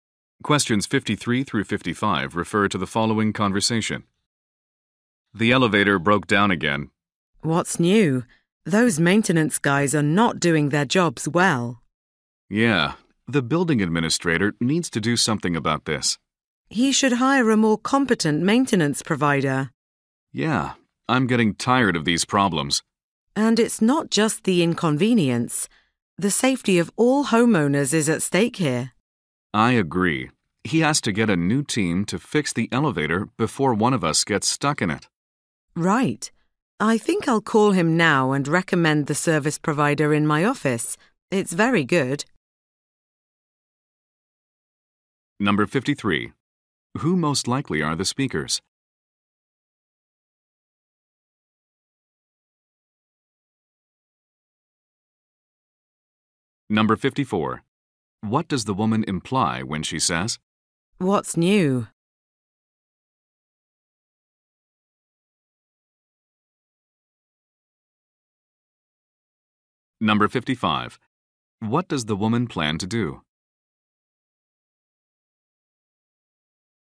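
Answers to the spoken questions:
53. Homeowners living in the building.
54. The elevator breaks down often.
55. Call the administrator and recommend her office's maintenance provider.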